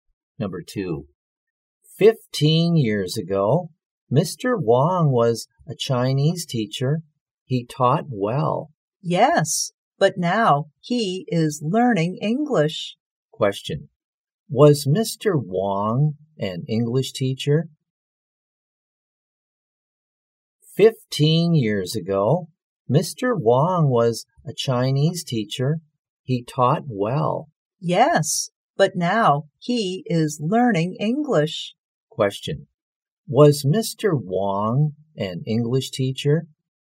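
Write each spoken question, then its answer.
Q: Was Mr. Wong an English teacher?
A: No, he was a Chinese teacher.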